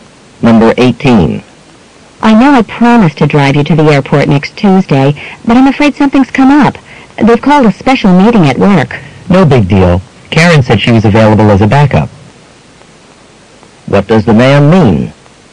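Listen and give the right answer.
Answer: Karen can drive him instead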